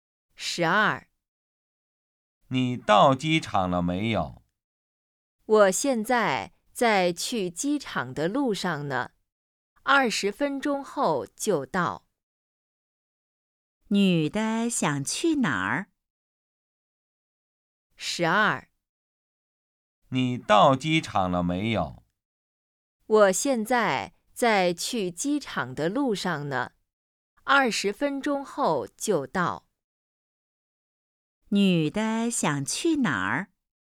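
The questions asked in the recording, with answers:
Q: 女的想去哪儿?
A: 机场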